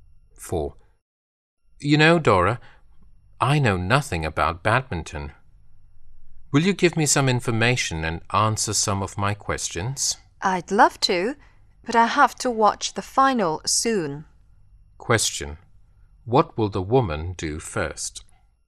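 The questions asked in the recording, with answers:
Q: What will the woman do first?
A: Watch the final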